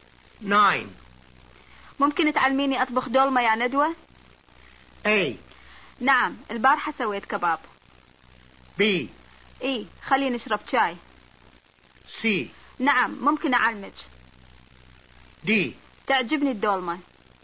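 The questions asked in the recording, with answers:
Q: ممكن تعلميني اطبخ دولمة يا ندوة؟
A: C: نعم ممكن أعلمك.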